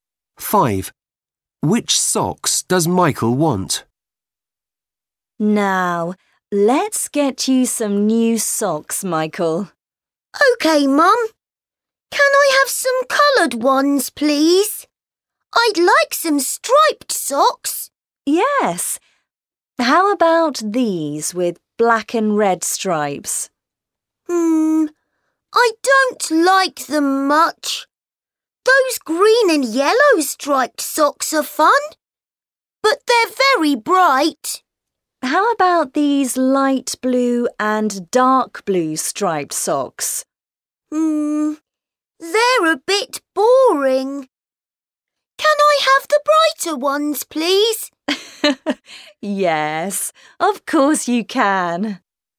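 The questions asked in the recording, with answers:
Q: Which socks does Michael want?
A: green and yellow striped socks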